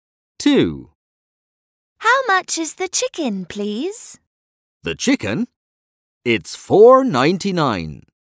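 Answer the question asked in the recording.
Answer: £4.99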